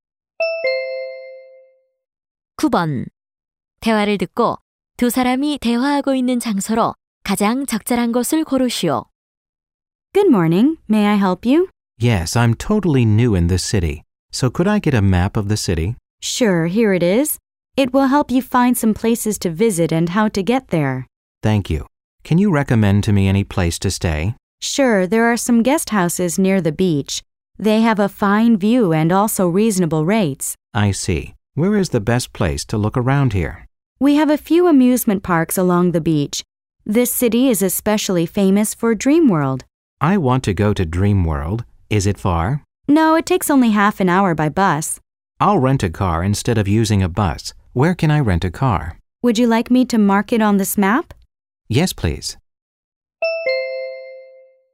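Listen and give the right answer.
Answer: 관광 안내소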